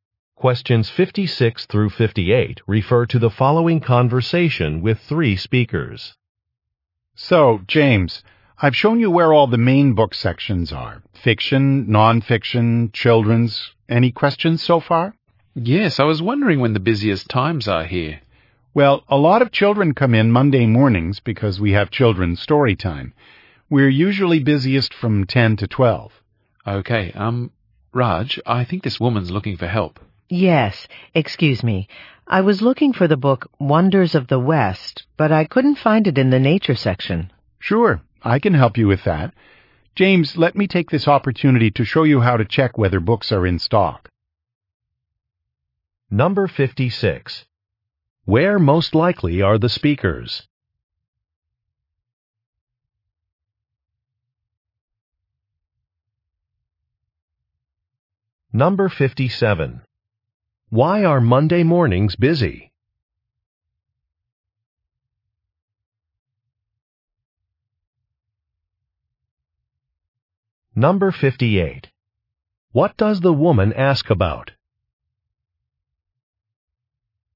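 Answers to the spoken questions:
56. In a bookstore
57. There is children's story time
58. The book Wonders of the West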